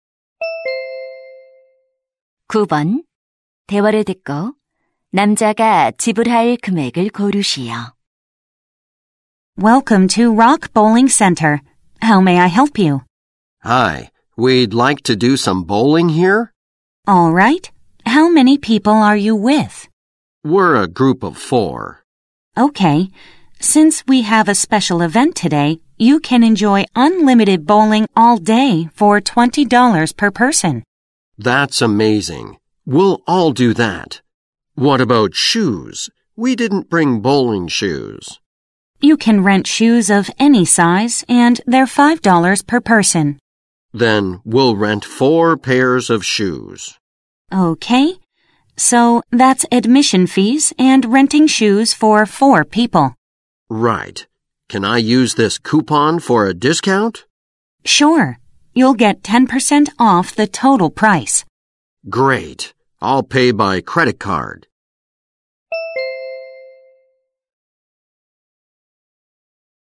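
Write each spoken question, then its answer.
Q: 대화를 듣고 남자가 지불할 금액을 고르시오.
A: $90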